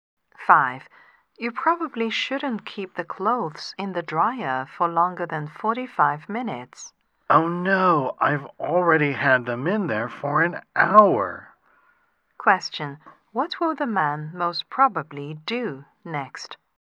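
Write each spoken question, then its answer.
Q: What will the man most probably do next?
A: Take the clothes out of the dryer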